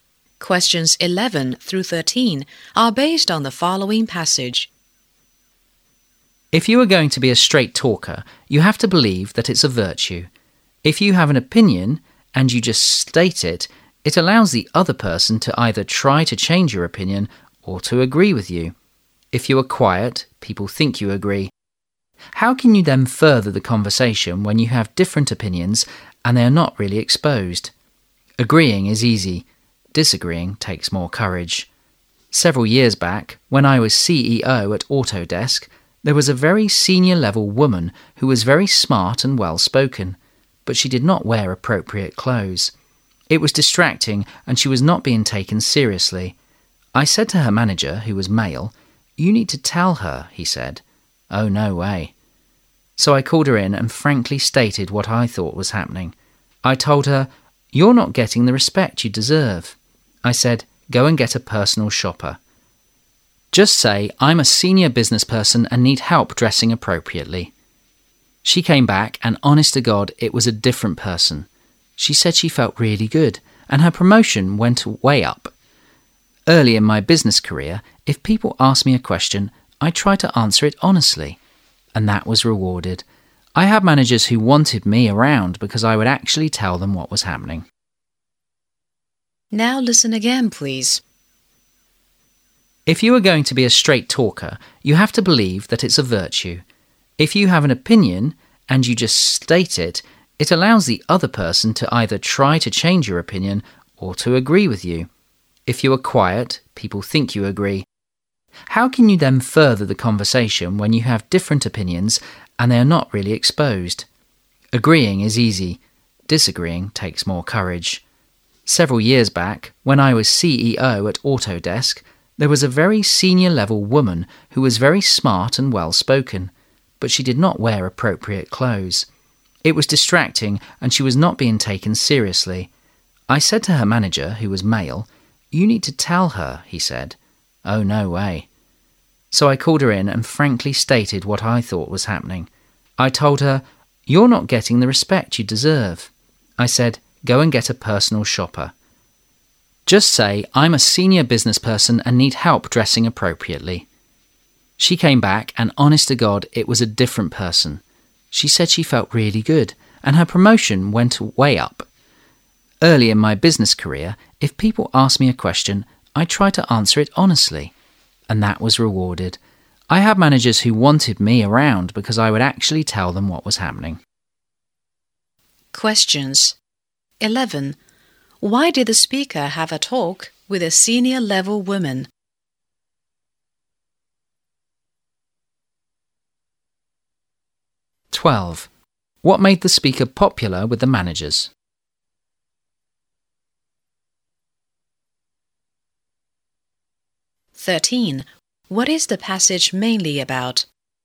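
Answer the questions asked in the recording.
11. Her clothes were inappropriate, so she wasn't taken seriously
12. He honestly told them what was happening
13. The value of being a straight talker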